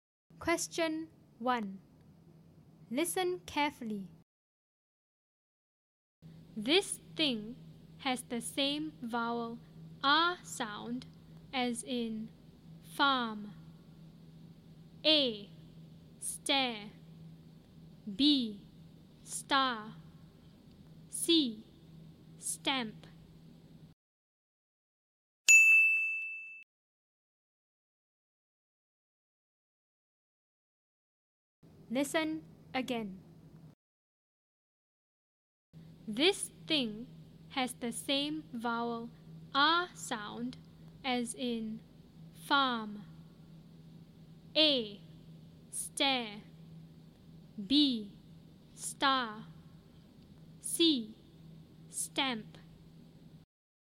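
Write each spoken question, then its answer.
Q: This thing has the same vowel R sound as in farm.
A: B: Star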